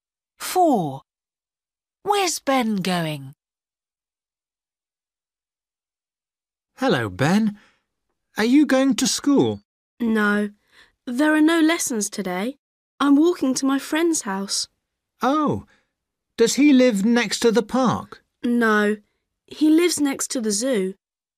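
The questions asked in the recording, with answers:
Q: Where's Ben going?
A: to his friend's house next to the zoo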